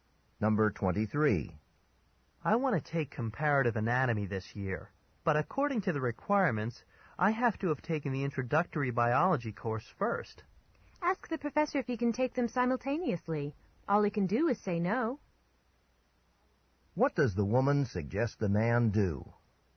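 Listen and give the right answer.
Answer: Ask the professor if he can take both courses at the same time.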